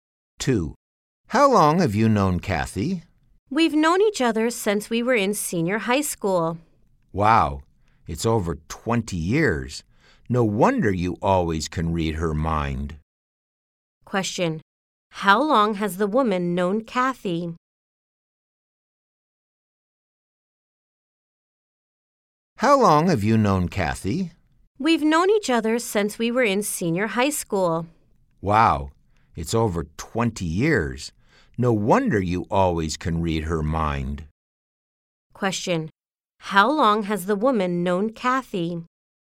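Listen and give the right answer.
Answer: Since senior high school; over 20 years.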